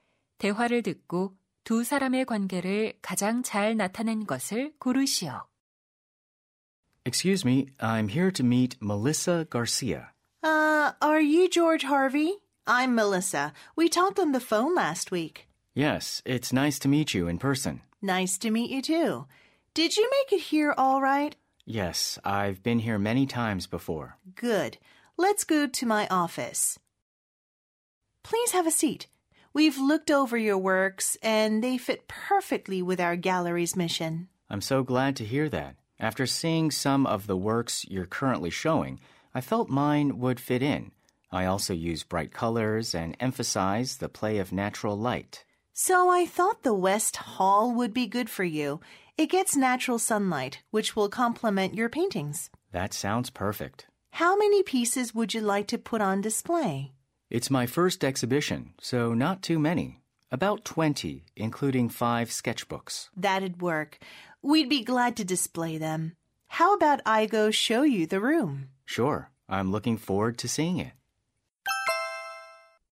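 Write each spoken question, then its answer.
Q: 대화를 듣고 두 사람의 관계를 가장 잘 나타낸 것을 고르시오.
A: 갤러리 큐레이터 - 화가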